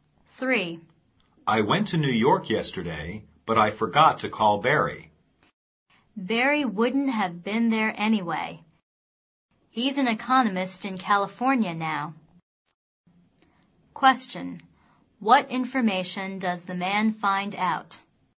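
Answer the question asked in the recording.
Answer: Barry is now an economist in California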